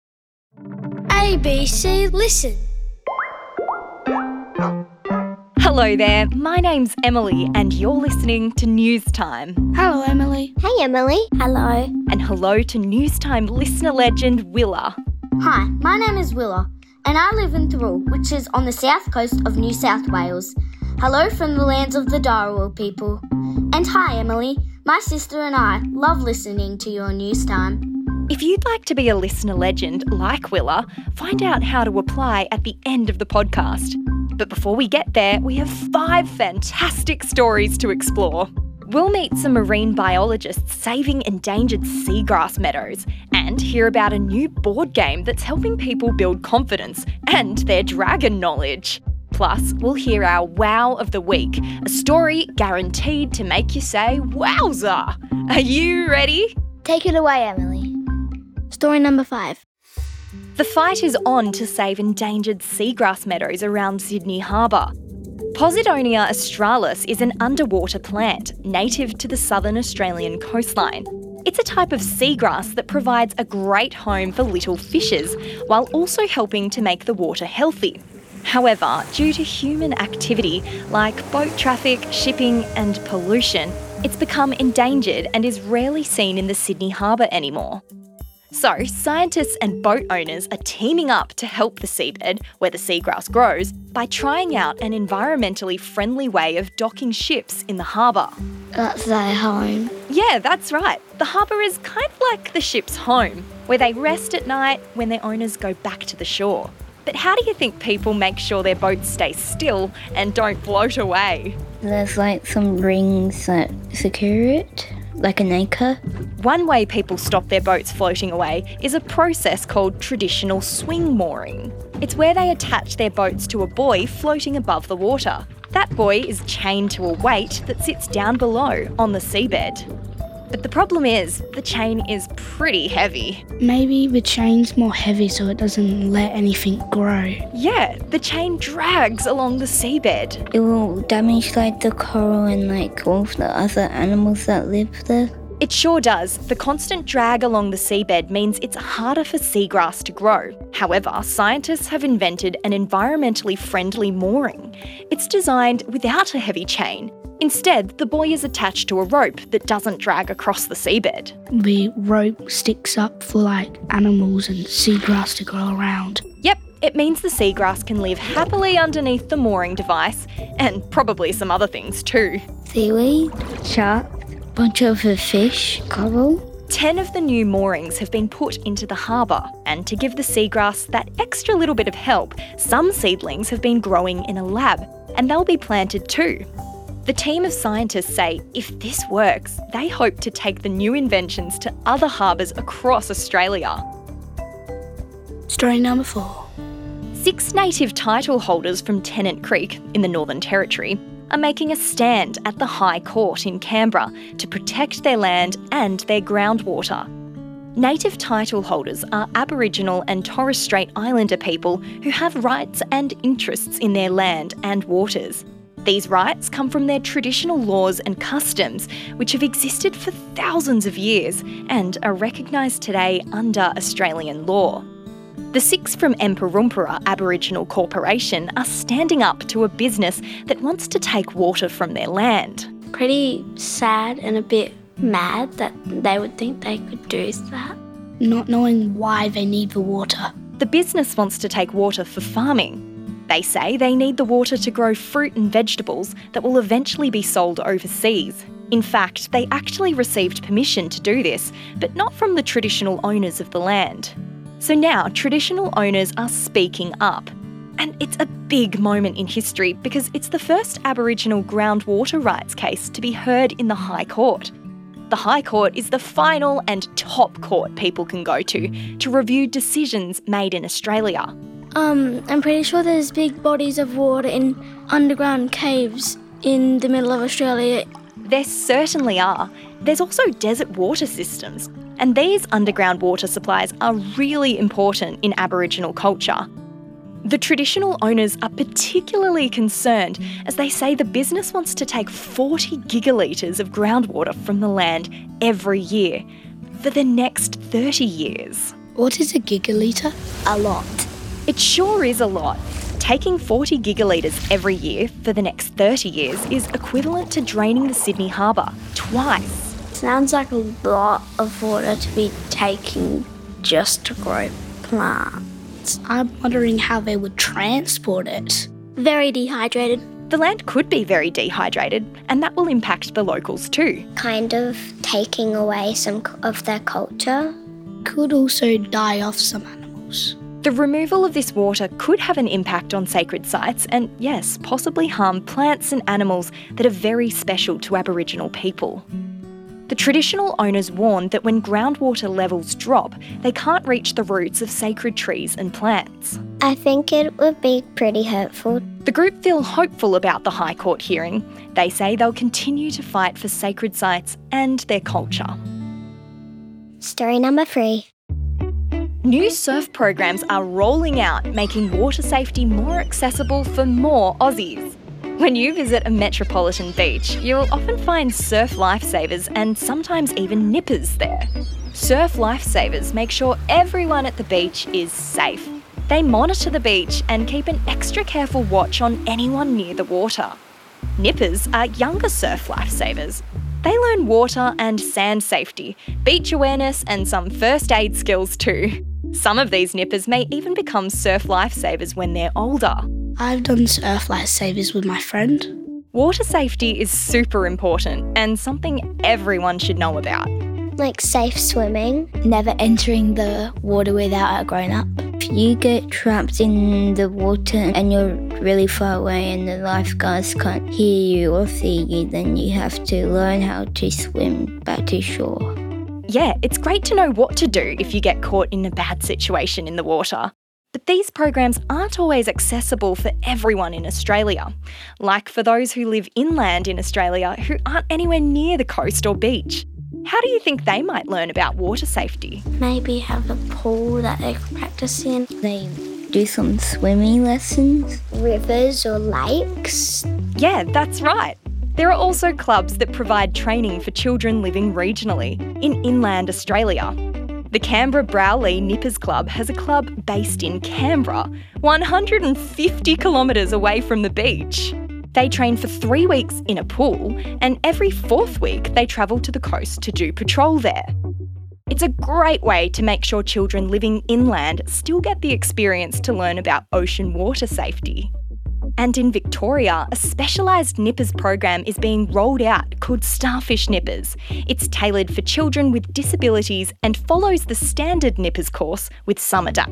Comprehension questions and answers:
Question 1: Where are they trialling the environmentally friendly mooring?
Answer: The Sydney harbour!